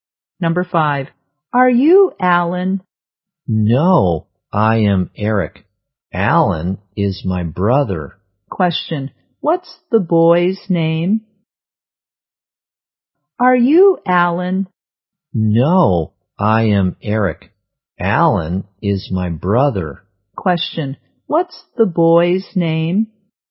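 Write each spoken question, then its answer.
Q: what's the boy's name?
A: Eric.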